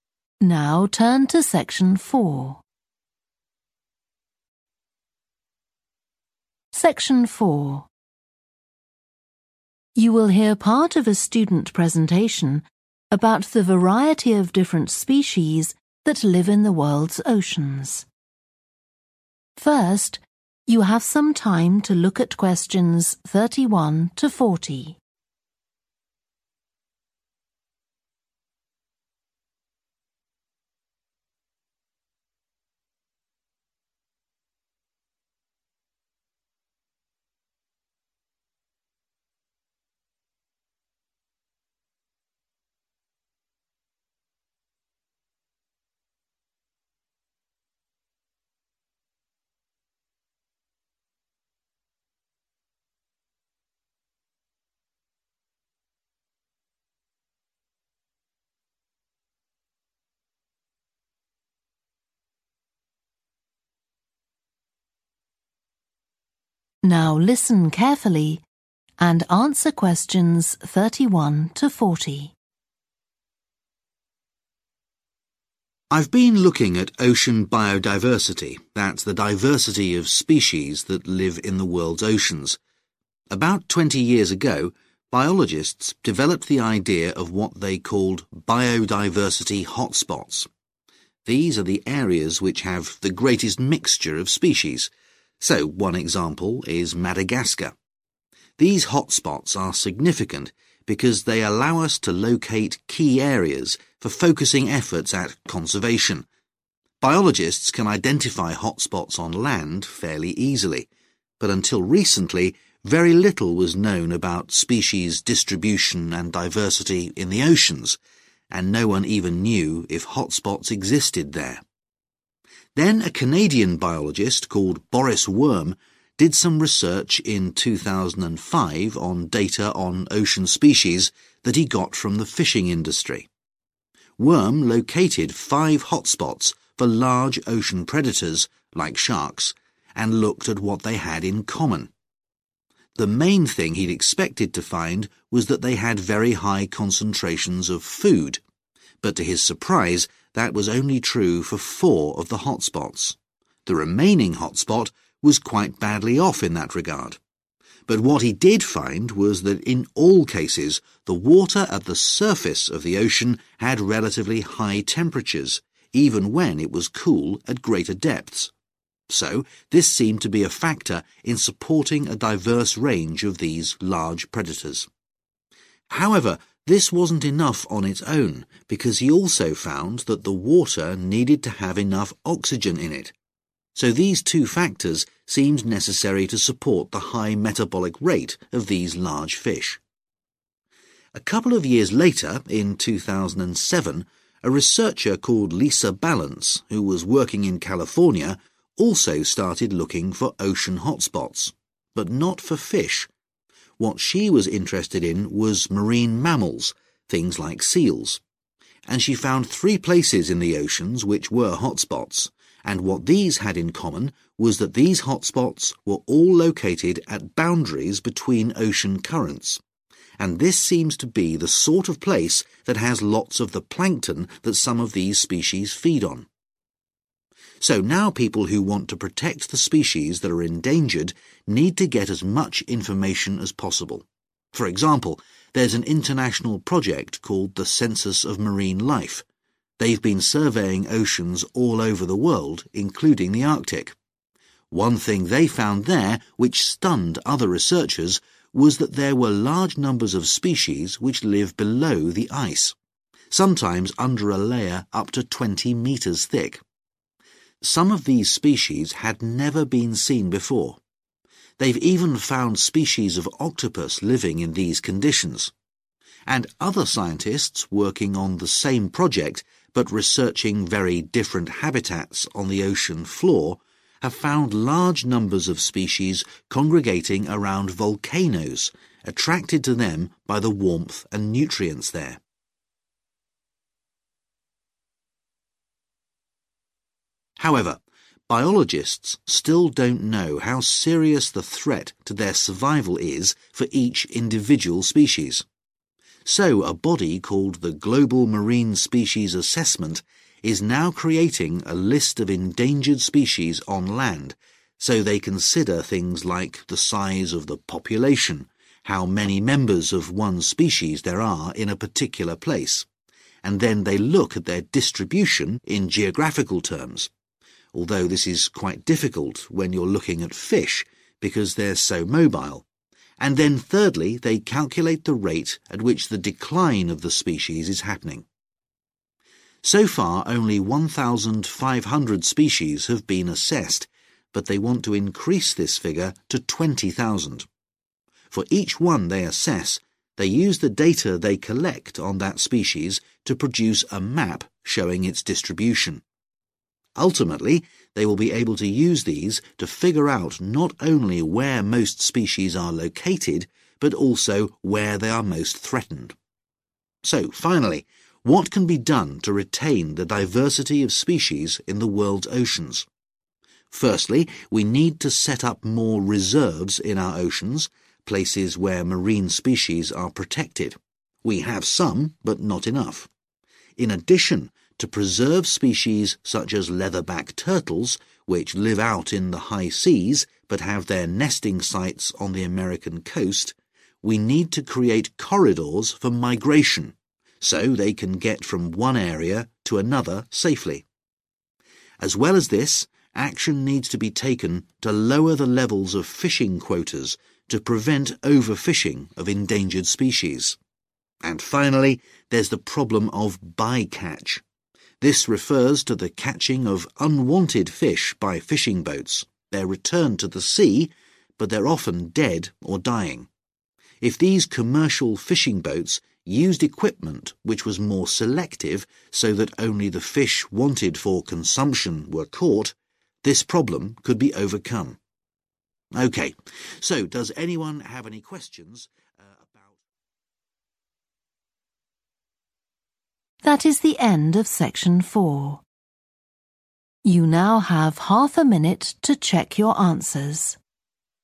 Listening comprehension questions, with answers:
Complete the notes below. Write ONE WORD ONLY.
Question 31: important for locating targets for (31)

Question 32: were not always rich in (32)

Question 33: had higher temperatures at the (33)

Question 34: had sufficient (34) in the water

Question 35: looked for hotspots for marine (35)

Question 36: under the (36)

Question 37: rate of (37)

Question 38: Aim: to assess 20,000 species and make a distribution (38) for each one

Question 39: establish (39) corridors (e.g. for turtles)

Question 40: catch fish only for the purpose of (40)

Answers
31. conservation
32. foods
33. surface
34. oxygen
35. mammals
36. ice
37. decline
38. map
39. migration
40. consumption